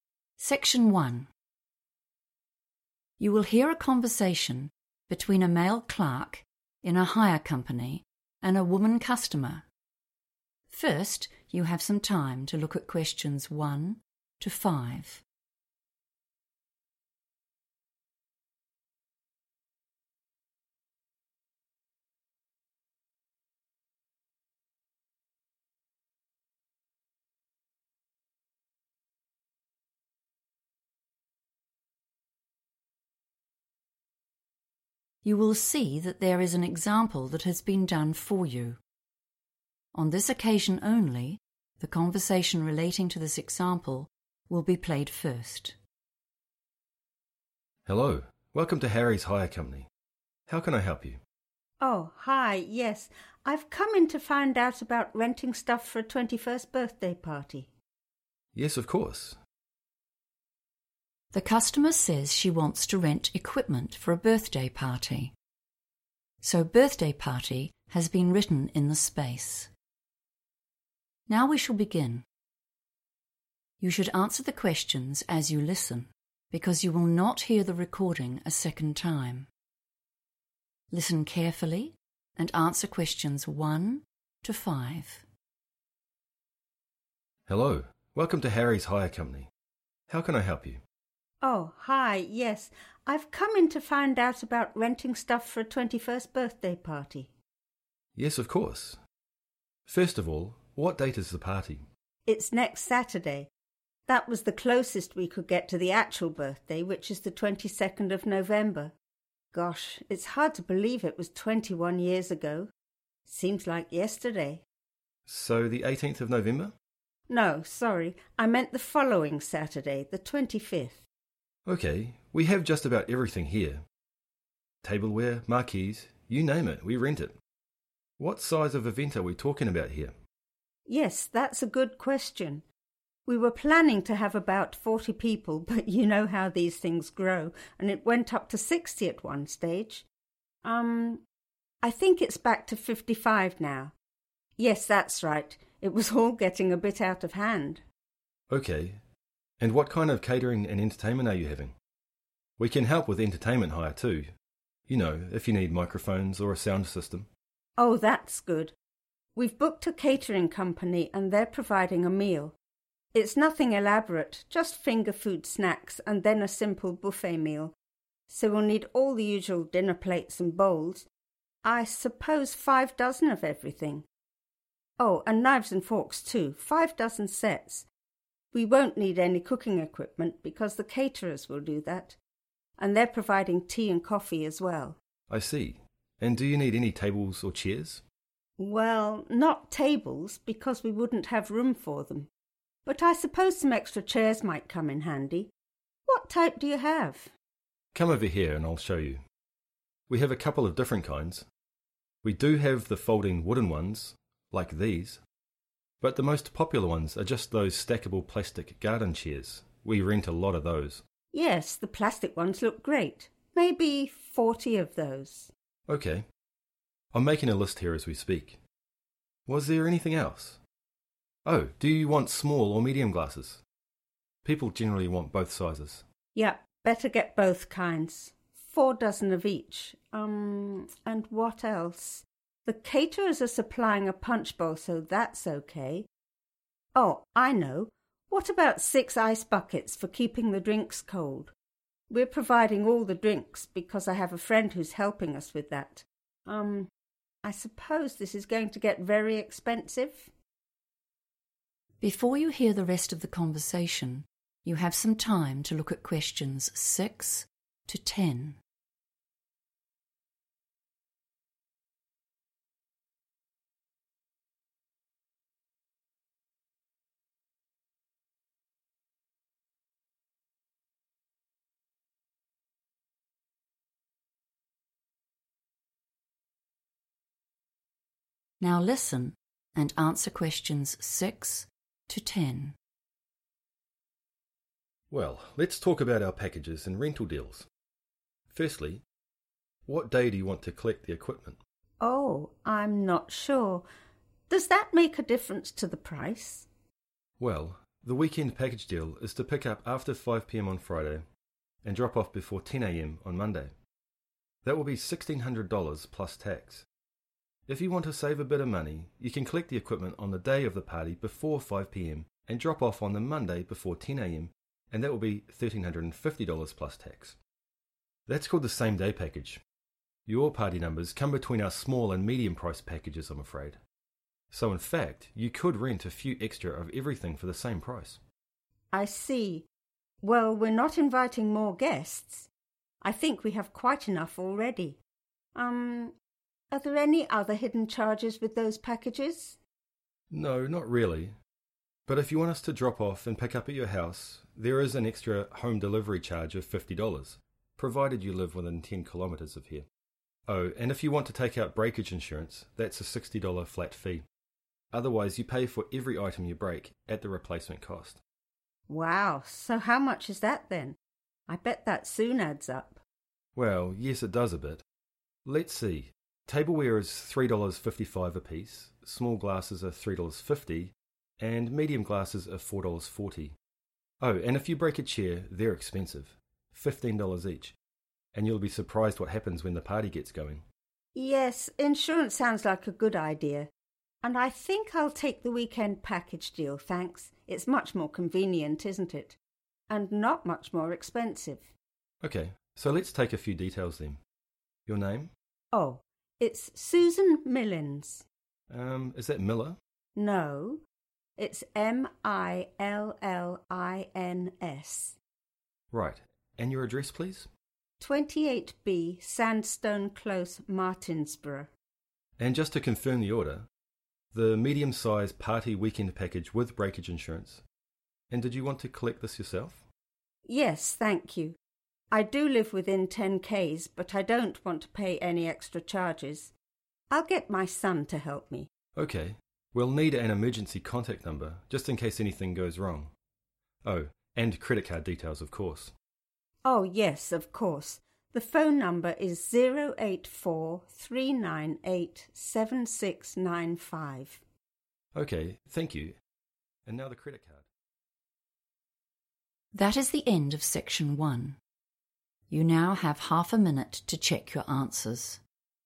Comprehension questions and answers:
Complete the notes below. Write NO MORE THAN TWO WORDS AND / OR A NUMBER for each answer.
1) Day and date of event: _____ November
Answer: Saturday 25th / Saturday 25 / Saturday the 25th

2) Number attending event: _____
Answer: 55 / fifty-five / fifty five

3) 5 dozen sets of _____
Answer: knives / forks

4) 40 plastic _____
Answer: garden chairs / chairs

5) six _____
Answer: ice buckets

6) _____ Package: 5 p.m. Sat – 10 a.m. Mon: $1350 + tax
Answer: same-day / same day

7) _____ : $50 (within 10 km)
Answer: home delivery

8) small glasses – $ _____ per item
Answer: 3.50

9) Full name: _____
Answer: Susan Millins

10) Contact number: 084 _____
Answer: 3987695

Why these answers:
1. The correct answer is Saturday 25th (or just 25) because the customer specifically corrects the staff member to confirm the party date. Although the actual birthday is the 22nd of November, she explains that the party itself is on the following Saturday, which is the 25th. The keywords 'Saturday' and '25th' provide the specific day and date needed for the form.
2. The correct answer is 55 because, during the conversation about the size of the event, the woman mentions that while the number of people changed several times, it is currently 'back to 55'. She confirms this total when she says 'Yes, that's right' immediately after mentioning 55.
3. The correct answer is "knives / forks" because the woman specifically mentions them when listing the equipment for the party. After saying she needs plates and bowls, she adds that she also needs "5 dozen sets" of knives and forks for the guests to use.
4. The correct answer is "(garden) chairs" because after the woman mentions needing extra chairs, the man describes their "plastic garden chairs" as their most popular choice. The woman agrees that they "look great" and requests "40 of those," which matches the quantity and material ("plastic") mentioned in the notes.
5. The correct answer is "ice buckets" because it is the specific item the customer asks for in a quantity of six. During the conversation, she realizes she needs something to keep the drinks chilled and mentions these items immediately after discussing the glasses and the punch bowl. The words match the number 'six' provided in the question prompt.
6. The correct answer is found when the man explains the different pricing options. He mentions a cheaper option that costs $1350 plus tax, which matches the price listed in the notes. He explicitly names this specific option the "same-day package."
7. The correct answer is 'home delivery' because the man mentions an extra cost of $50 specifically for bringing and picking up items from the customer's house, as long as they live within 10 km. In the notes, this extra cost is listed right before the '$50' and the '(within 10 km)' note, which matches the man's explanation.
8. The correct answer is found when the shop assistant explains the costs for items that are broken. He gives a list of prices: $3.55 for tableware, $3.50 for small glasses, and $4.40 for medium glasses. Since the question asks for the price of small glasses, $3.50 is the right answer. In English, '$3.50' and 'three dollars fifty' mean the same thing.
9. The correct answer is Susan Millins because the man asks for her name to complete the hire details. When the woman says her name, the man is not sure if he heard it right, so the woman spells her last name out loud to show it is Millins, not Miller.
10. The correct answer is 3987695 because, at the very end of the conversation, the worker asks for an emergency contact number. The customer responds by providing her phone number as 084 – 398 – 7695. Since the form already provides the '084' part, the digits needed to complete the contact number are 3987695.

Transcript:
MAN: Hello, welcome to Harry's Hire Company. How can I help you?
WOMAN: Oh, hi, yes, I've come in to find out about renting stuff for a 21st birthday party.
MAN: Yes, of course ...
The customer says she wants to rent equipment for a birthday party, so birthday party has been written in the space. Now we shall begin. You should answer the questions as you listen because you will not hear the recording a second time. Listen carefully and answer questions 1 to 5.
MAN: Yes, of course ... First of all, what date is the party?
WOMAN: It's next Saturday. That was the closest we could get to the actual birthday, which is the 22nd of November. Gosh, it's hard to believe it was 21 years ago, seems like yesterday ...
MAN: So, the 18th of November?
WOMAN: No, sorry, I meant the following Saturday, the 25th.
MAN: OK, we have just about everything here; tableware, marquees ... you name it, we rent it! What size of event are we talking about here?
WOMAN: Yes, that's a good question. We were planning to have about 40 people, but you know how these things grow and it went up to 60 at one stage ... I think it's back to 55 now. Yes, that's right. It was all getting a bit out of hand.
MAN: Ok, and what kind of catering and entertainment are you having? We can help with entertainment hire, too, you know, if you need microphones or a sound system.
WOMAN: Oh, that's good! We've booked a catering company, and they're providing a meal. It's nothing elaborate, just finger food snacks and then a simple buffet meal, so we'll need all the usual dinner plates and bowls ... I suppose 5 dozen of everything, oh and knives and forks too, 5 dozen sets. We won't need any cooking equipment, because the caterers will do that, and they're providing tea and coffee as well.
MAN: I see, and do you need any tables or chairs.
WOMAN: Well, not tables, because we wouldn't have room for them, but I suppose some extra chairs might come in handy. What type do you have?
MAN: Come over here and I'll show you. We have a couple of different kinds. We do have folding wooden ones, like these, but the most popular ones are just those stackable plastic garden chairs, we rent a lot of those...
WOMAN: Yes, the plastic ones look great. Maybe 40 of those.
MAN: Ok ... I'm making a list here as we speak. Was there anything else? Oh, do you want small or medium glasses? People generally want both sizes.
WOMAN: Yep, better get both kinds. Four dozen of each. and what else? The caterers are supplying a punch bowl, so that's OK. Oh, I know, what about six ice buckets, for keeping the drinks cold? We're providing all the drinks, because I have a friend who is helping us with that. I suppose this is going to get very expensive.
Before you hear the rest of the conversation, you have some time to look at questions 6 to 10.
Now listen and answer questions 6 to 10.
MAN: Well, let's talk about our packages and rental deals. Firstly... what day do you want to collect the equipment?
WOMAN: Oh, I'm not sure. Does that make a difference to the price?
MAN: Well ... the weekend package deal is to pick up after 5 p.m. on Friday, and drop off before 10 a.m. on Monday. That will be sixteen hundred dollars plus tax. If you want to save a bit of money, you can collect the equipment on the day of the party before 5 p.m., and drop off on the Monday before 10 a.m., and that will be thirteen hundred and fifty dollars plus tax. That's called the same-day package. Your party numbers come between our small and medium price packages, I'm afraid, so in fact you could rent a few extra of everything for the same price.
WOMAN: I see. Well, we're not inviting more guests! I think we have quite enough already ... are there any other hidden charges with those packages?
MAN: No, not really. But if you want us to drop off and pick up at your house, there is an extra home delivery charge of $50, provided you live within 10 km of here. Oh, and if you want to take out breakage insurance, that's a $60 flat fee. Otherwise, you pay for every item you break, at the replacement cost.
WOMAN: Wow, so how much is that then? I bet that soon adds up.
MAN: Well, yes, it does a bit. Let's see ... tableware is $3.55 a piece, small glasses are $3.50 and medium glasses are $4.40. Oh, and if you break a chair, they're expensive: $15 each, and you'd be surprised what happens when the party gets going!
WOMAN: Yes, insurance sounds like a good idea, and I think I'll take the weekend package deal, thanks, it's much more convenient, isn't it? And not much more expensive.
MAN: OK, so let's take a few details then. Your name?
WOMAN: Oh, it's Susan Millins.
MAN: Um ... Is that Miller?
WOMAN: No, it's M-I-L-L-I-N-S
MAN: Right. And your address please?
WOMAN: 28B Sandstone Close, Martinsborough
MAN: And just to confirm the order; the medium-size party weekend package with breakage insurance, and did you want to collect this yourself?
WOMAN: Yes, thank you. I do live within 10 km, but I don't want to pay any extra charges. I'll get my son to help me.
MAN: OK, we'll need an emergency contact number, just in case anything goes wrong. Oh, and credit card details, of course.
WOMAN: Oh, yes, of course, the phone number is 084 – 398 – 7695
That is the end of section 1. You now have half a minute to check your answers.